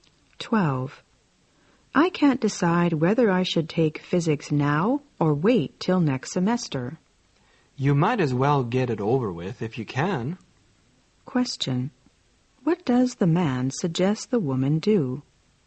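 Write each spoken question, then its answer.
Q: What does the man suggest the woman do?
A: Take physics now.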